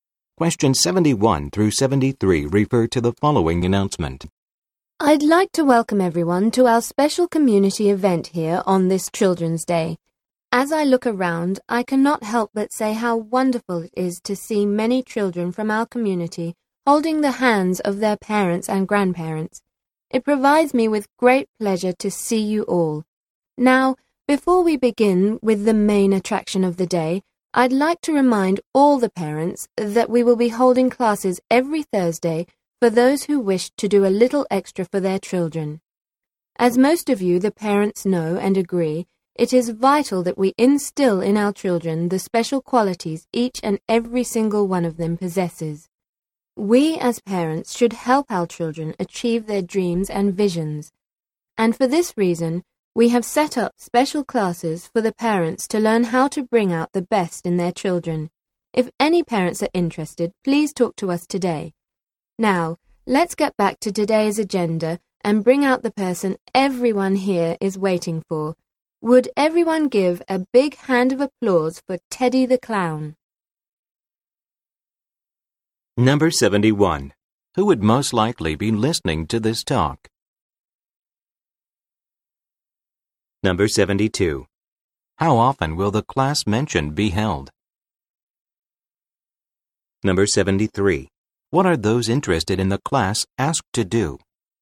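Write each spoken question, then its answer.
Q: Who would most likely be listening to this talk?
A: Parents and children at a community Children's Day event

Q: How often will the class mentioned be held?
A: Every Thursday

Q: What are those interested in the class asked to do?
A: Talk to the organizers today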